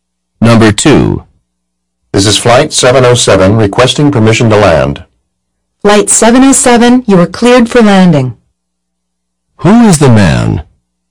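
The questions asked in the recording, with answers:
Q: Who is the man?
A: A pilot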